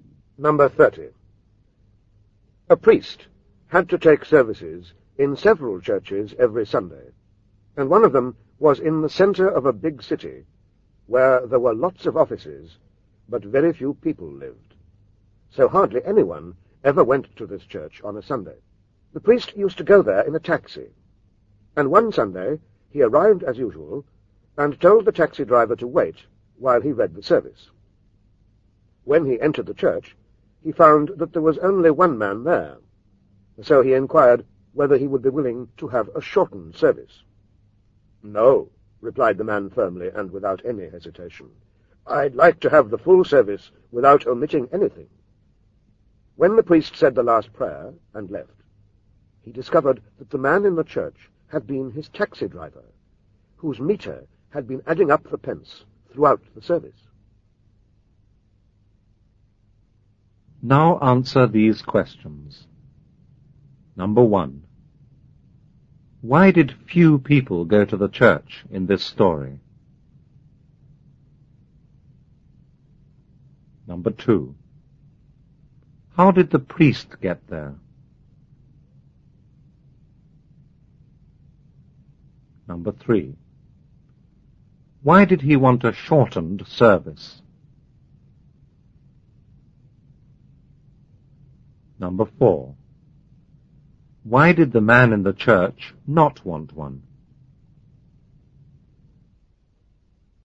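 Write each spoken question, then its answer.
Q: Why did few people go to the church in this story?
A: Because very few people lived in that part of the city; it was mostly offices.

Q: How did the priest get there?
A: By taxi.

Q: Why did he want a shortened service?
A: Because there was only one man in the church.

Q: Why did the man in the church not want one?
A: He was the taxi driver, and his meter was running up money the whole time the service lasted.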